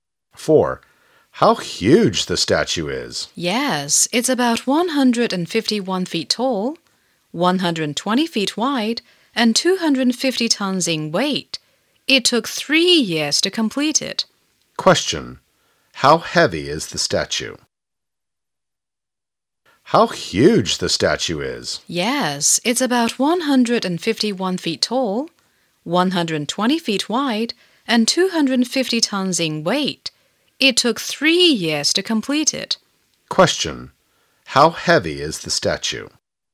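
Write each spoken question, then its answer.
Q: How heavy is the statue?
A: 250 tons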